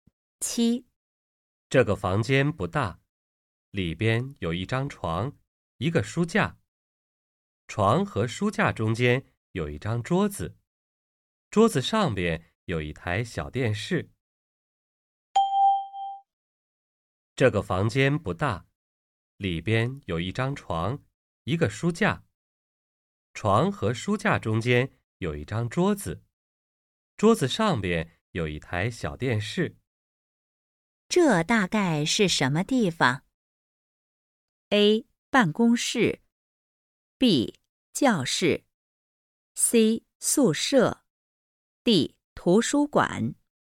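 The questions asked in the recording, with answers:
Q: 这大概是什么地方?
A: C: 宿舍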